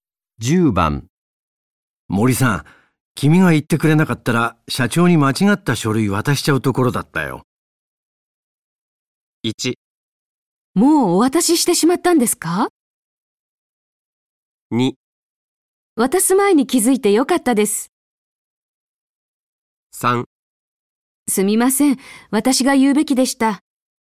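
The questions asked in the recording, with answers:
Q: 森さん、君が言ってくれなかったら社長に間違った書類渡しちゃうところだったよ。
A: 2: 渡す前に気づいてよかったです。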